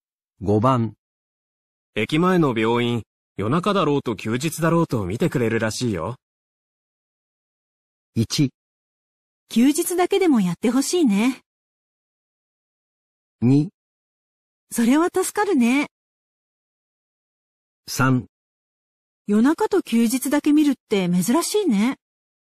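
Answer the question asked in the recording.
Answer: 2: それは助かるね。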